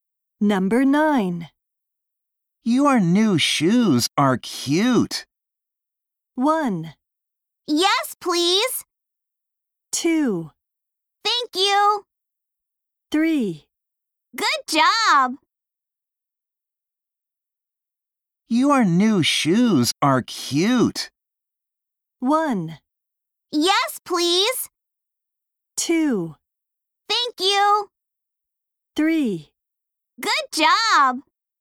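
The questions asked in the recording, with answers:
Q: Your new shoes are cute.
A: 2: Thank you.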